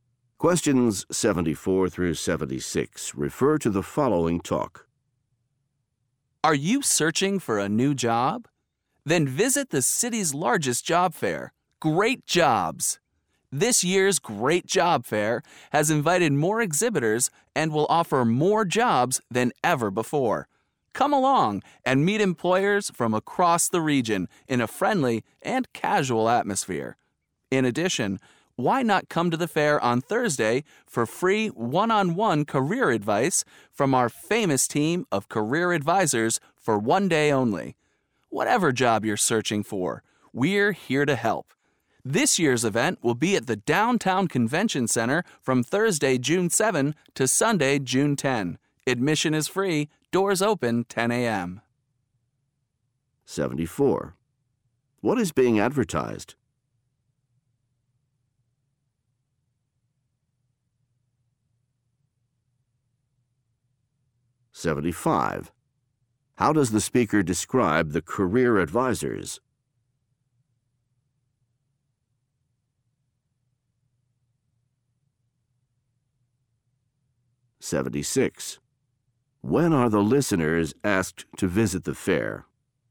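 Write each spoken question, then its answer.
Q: What is being advertised?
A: A job fair

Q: How does the speaker describe the career advisors?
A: Famous

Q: When are the listeners asked to visit the fair?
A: On Thursday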